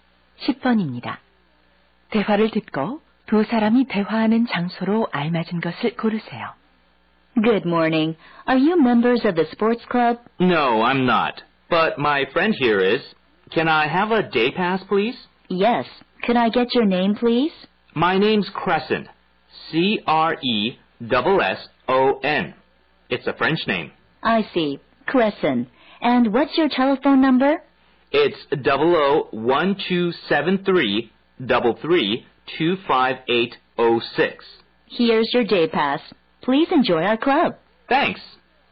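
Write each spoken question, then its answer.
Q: 대화를 듣고 두 사람이 대화하는 장소로 알맞은 것을 고르세요.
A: 스포츠 클럽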